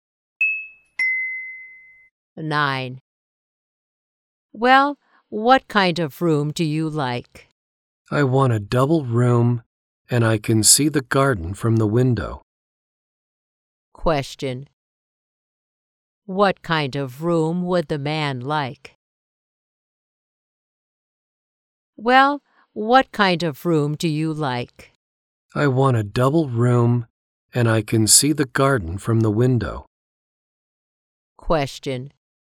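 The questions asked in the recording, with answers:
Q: What kind of room would the man like?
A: A double room with a view of the garden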